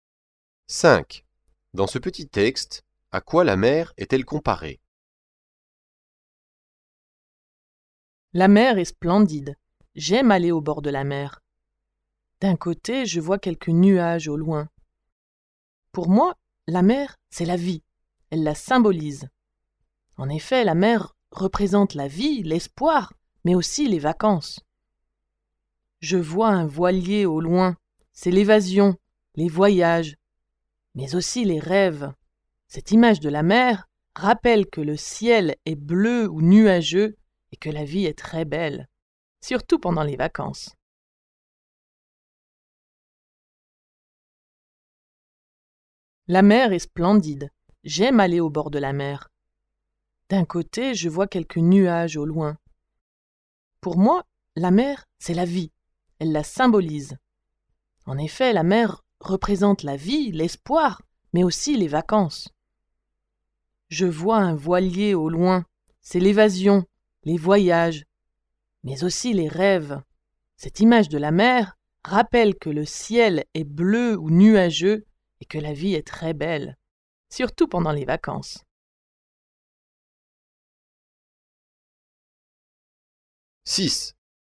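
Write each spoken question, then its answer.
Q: Dans ce petit texte, à quoi la mer est-elle comparée?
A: À la vie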